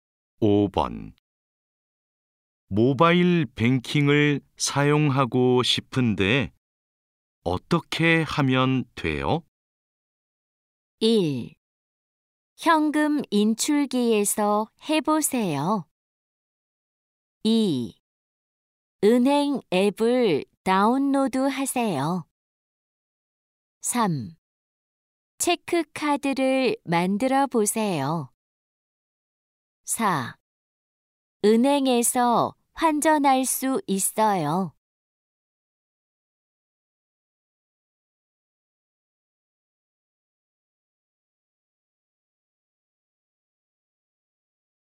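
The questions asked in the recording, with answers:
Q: 모바일 뱅킹을 사용하고 싶은데 어떻게 하면 돼요?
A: 2: 은행 앱을 다운로드 하세요.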